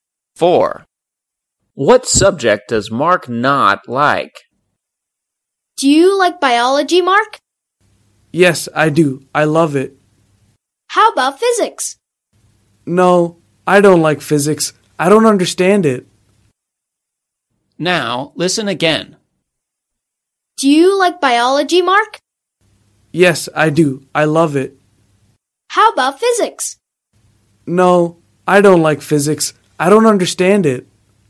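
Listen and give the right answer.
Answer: physics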